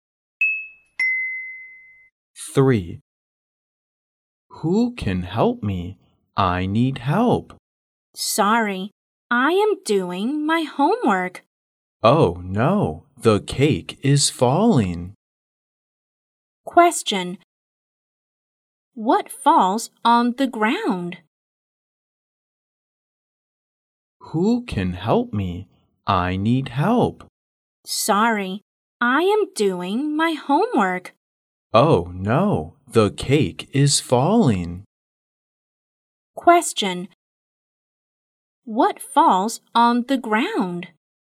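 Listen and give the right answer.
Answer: The cake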